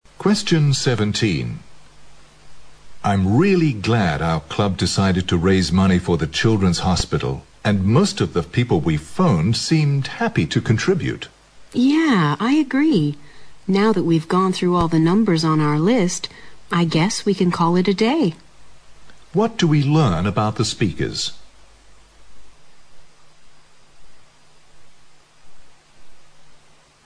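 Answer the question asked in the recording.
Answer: They have finished phoning everyone on their list to raise money for the children's hospital.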